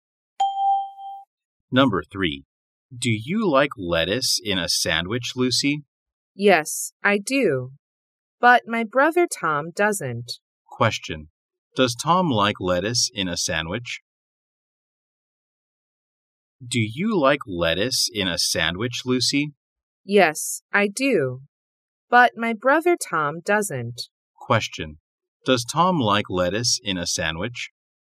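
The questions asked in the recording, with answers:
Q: Does Tom like lettuce in a sandwich?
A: No, he doesn't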